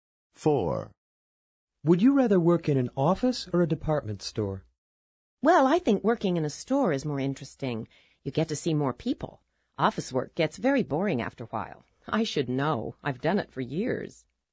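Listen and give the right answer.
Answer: A department store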